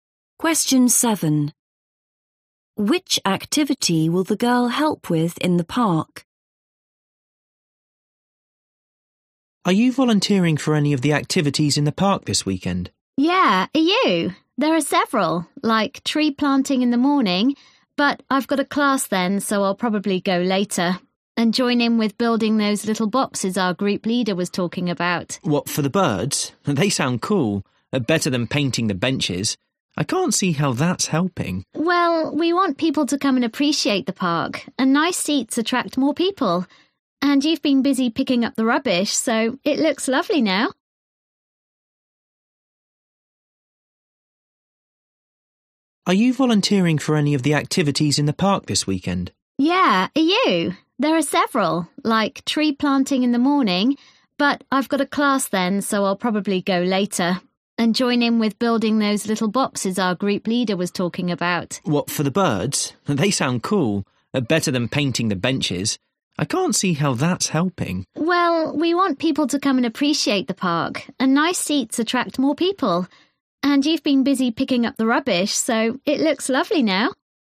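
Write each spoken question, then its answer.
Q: Which activity will the girl help with in the park?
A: building bird boxes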